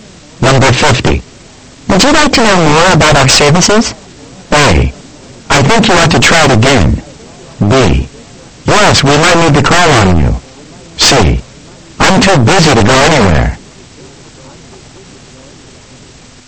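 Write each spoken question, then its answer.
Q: Would you like to know more about our services?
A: B: Yes, we might need to call on you.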